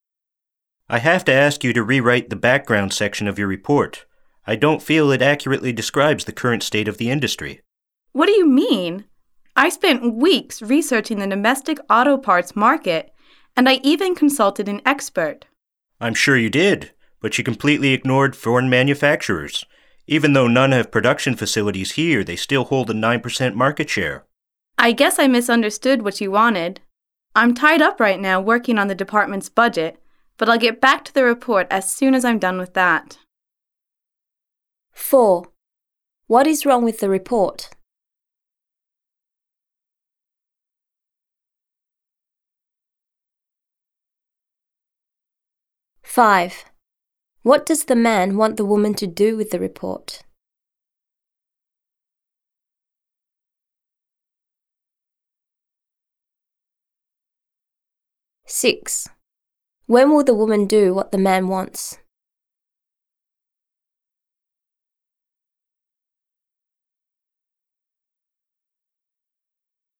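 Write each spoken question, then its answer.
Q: What is wrong with the report?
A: It ignores foreign manufacturers

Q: What does the man want the woman to do with the report?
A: Rewrite the background section

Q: When will the woman do what the man wants?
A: After she finishes working on the department's budget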